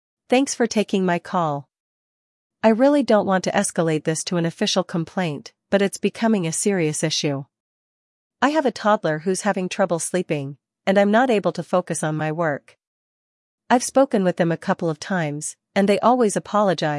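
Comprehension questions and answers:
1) What is the reason Sarah is concerned about the noise?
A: It is affecting her toddler's sleep

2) How has Sarah addressed the problem with her neighbor?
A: She spoke to them directly

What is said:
Thanks for taking my call. I really don't want to escalate this to an official complaint, but it's becoming a serious issue. I have a toddler who's having trouble sleeping, and I'm not able to focus on my work. I've spoken with them a couple of times, and they always apologize but the noise continues.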